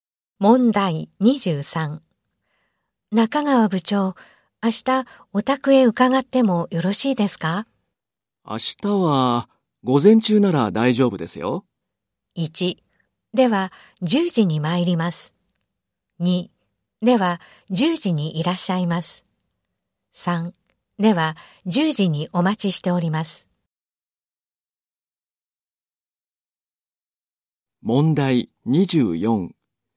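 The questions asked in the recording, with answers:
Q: 中川部長、明日お宅へ伺ってもよろしいですか?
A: 1: では10時に参ります。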